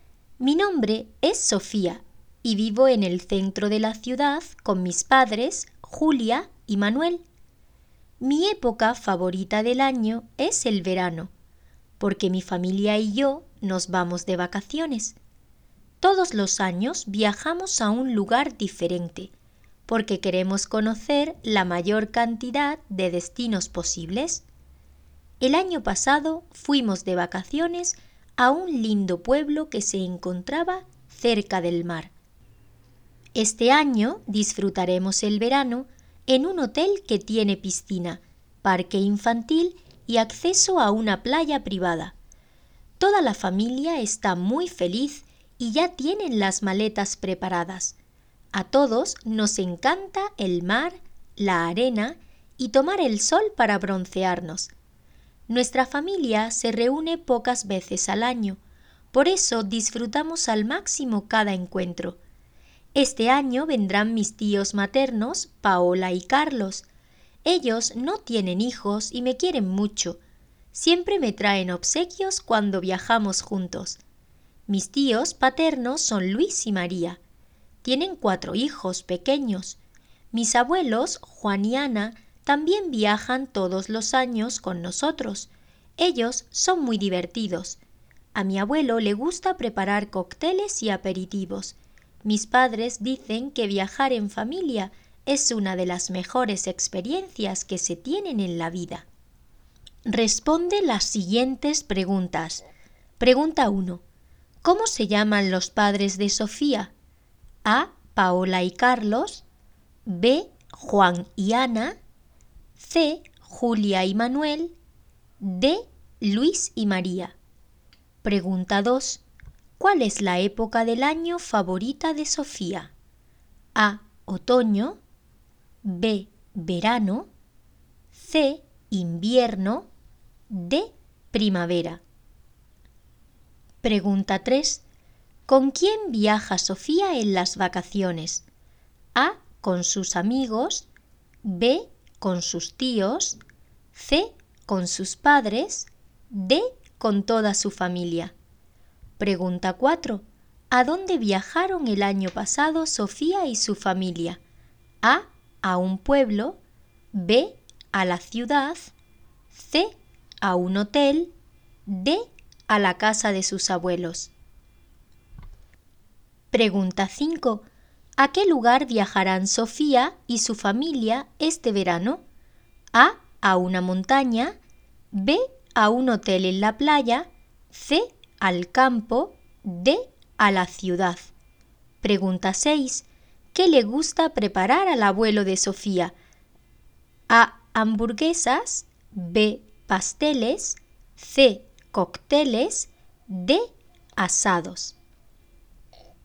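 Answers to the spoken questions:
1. C: Julia y Manuel
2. B: Verano
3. D: Con toda su familia
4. A: A un pueblo
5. B: A un hotel en la playa
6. C: Cócteles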